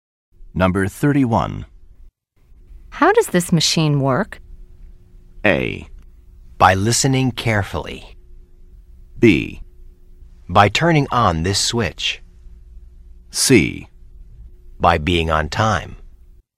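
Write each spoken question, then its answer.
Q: How does this machine work?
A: B: By turning on this switch.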